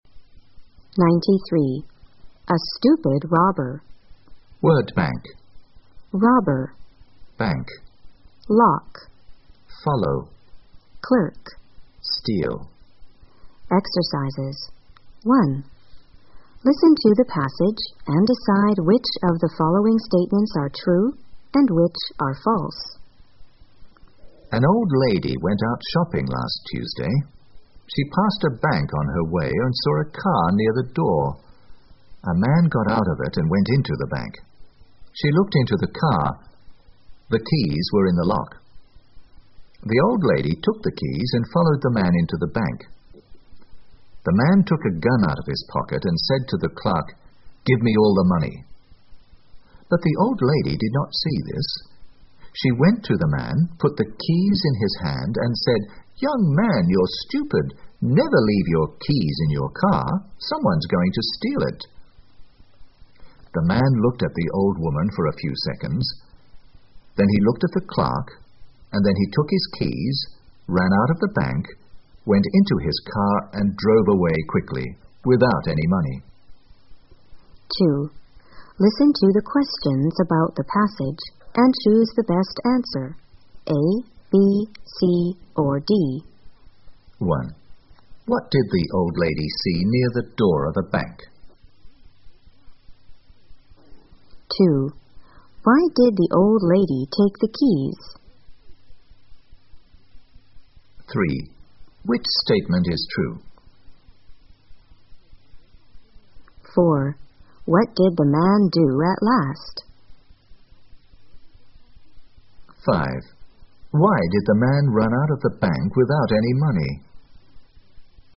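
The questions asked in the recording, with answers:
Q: What did the old lady see near the door of the bank?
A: A car

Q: What did the man do at last?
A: He took his keys, ran out of the bank and drove away quickly without any money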